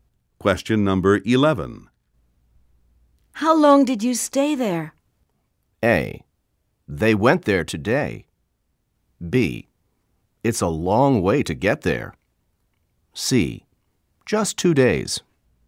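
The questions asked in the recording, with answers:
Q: How long did you stay there?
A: C: Just 2 days.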